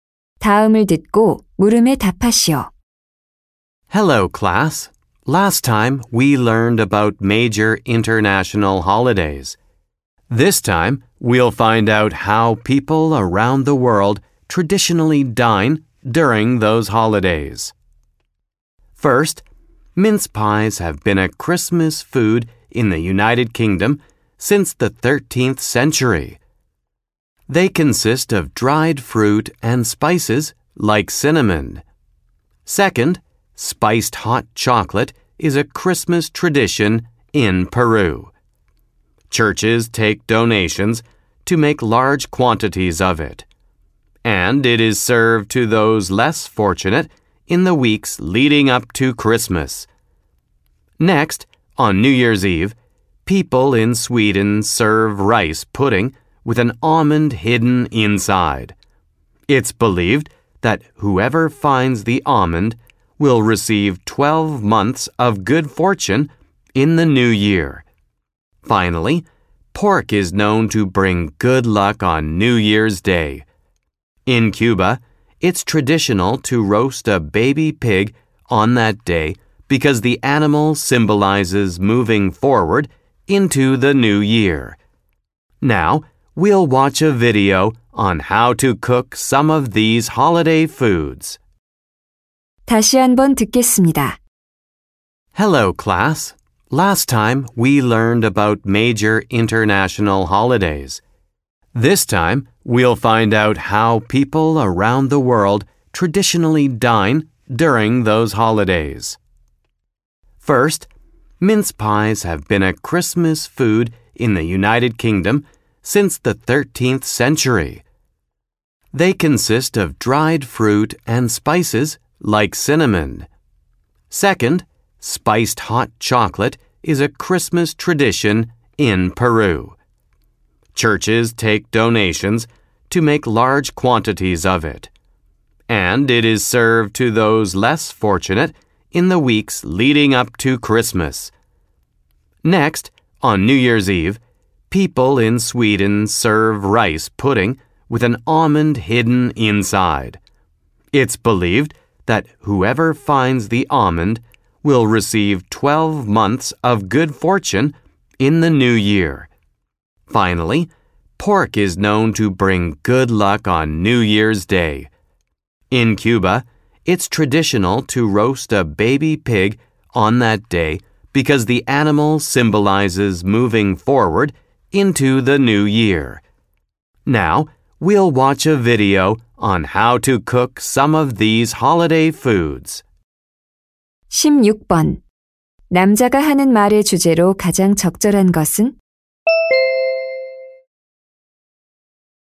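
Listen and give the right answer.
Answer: 세계 여러 나라의 전통 명절 음식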